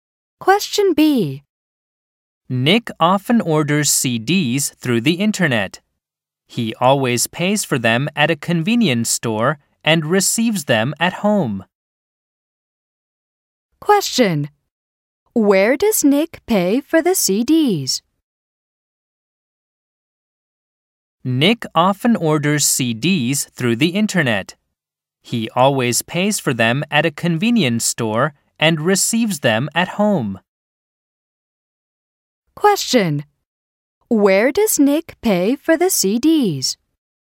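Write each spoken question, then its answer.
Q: Where does Nick pay for the CDs?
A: At a convenience store.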